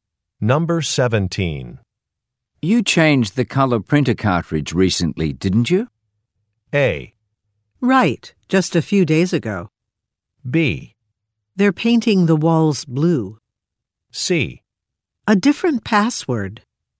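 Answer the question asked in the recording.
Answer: A: Right, just a few days ago.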